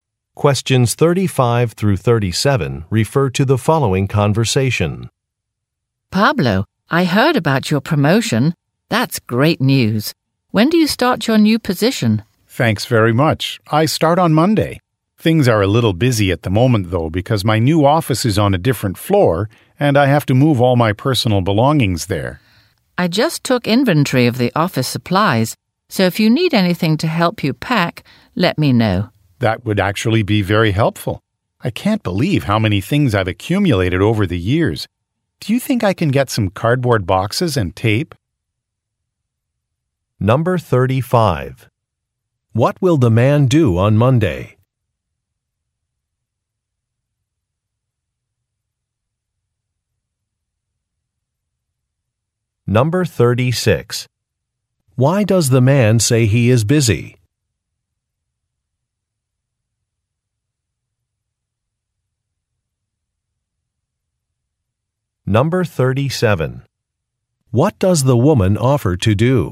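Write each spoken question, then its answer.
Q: What will the man do on Monday?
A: Start his new position

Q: Why does the man say he is busy?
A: He has to move his belongings to his new office on a different floor

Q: What does the woman offer to do?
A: Provide office supplies to help him pack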